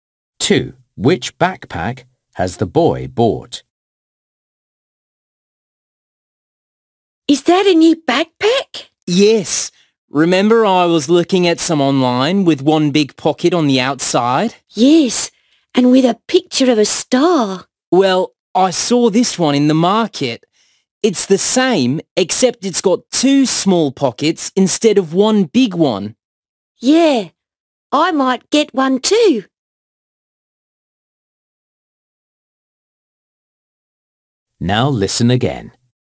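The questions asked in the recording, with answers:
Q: Which backpack has the boy bought?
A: The one with a star picture and two small pockets on the outside.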